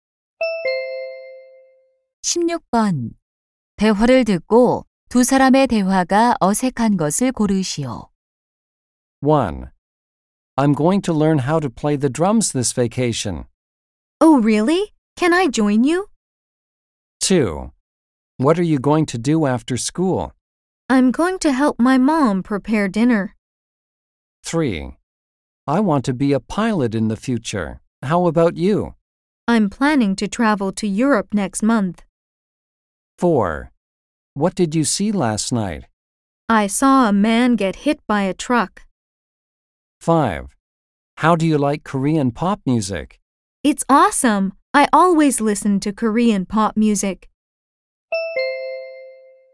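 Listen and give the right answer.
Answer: 3번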